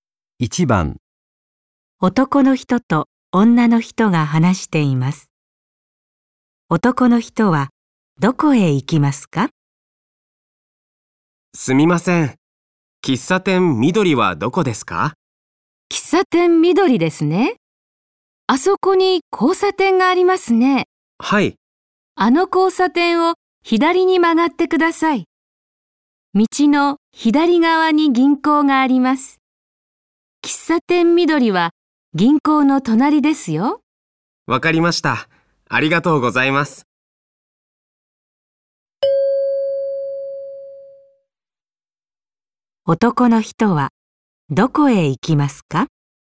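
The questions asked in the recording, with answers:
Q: 男の人はどこへ行きますか?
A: 喫茶店緑(銀行の隣)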